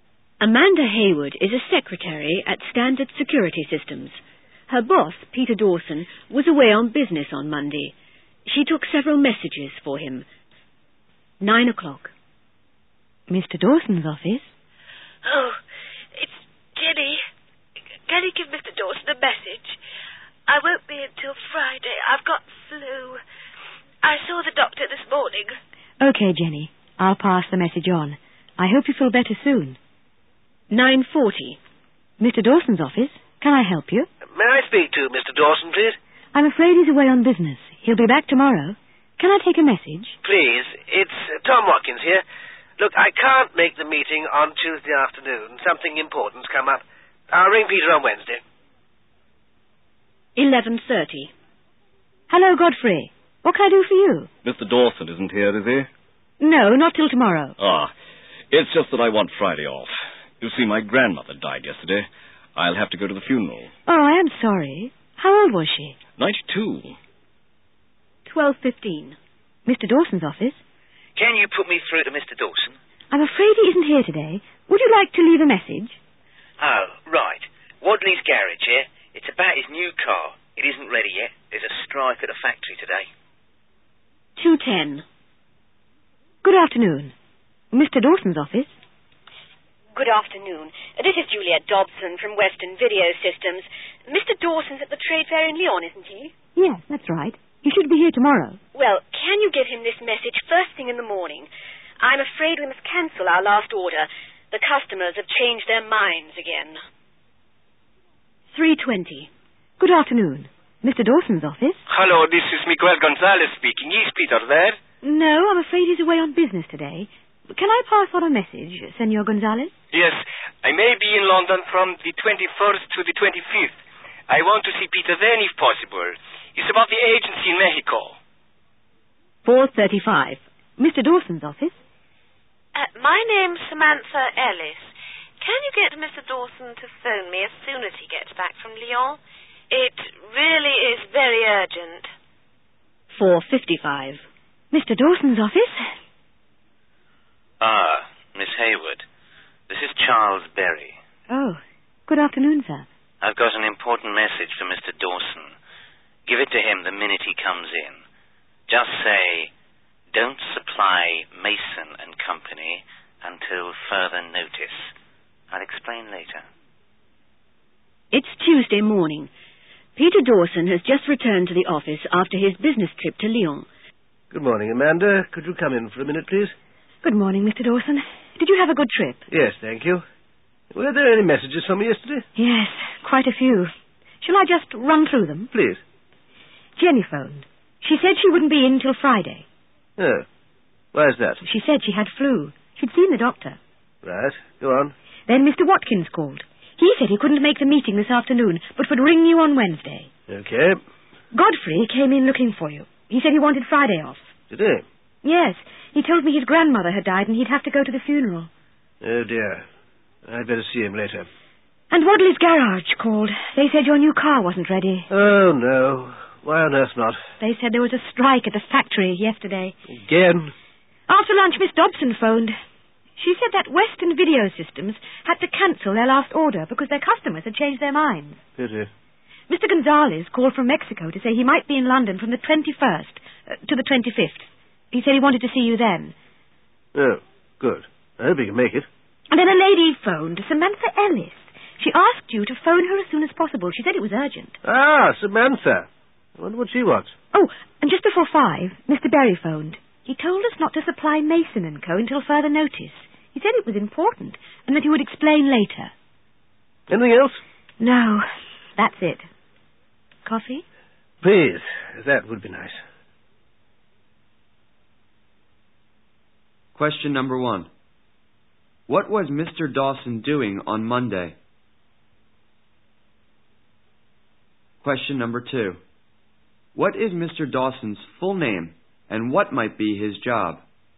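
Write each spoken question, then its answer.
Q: What was Mr. Dawson doing on Monday?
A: He was away on business, at the trade fair in Lyon.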